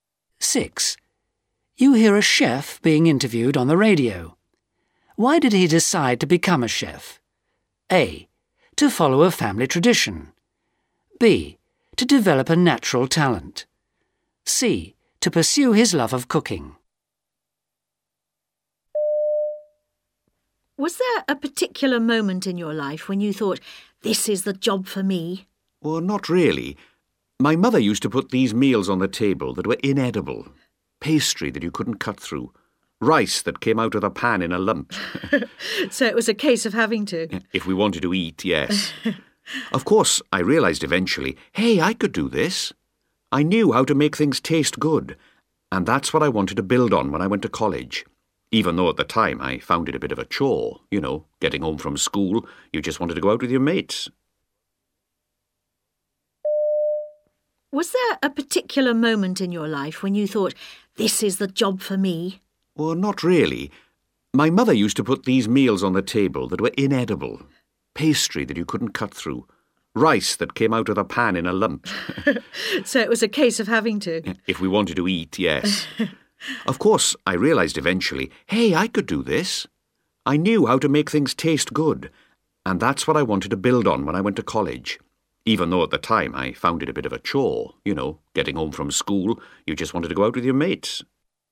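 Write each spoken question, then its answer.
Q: Why did he decide to become a chef?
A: B: To develop a natural talent.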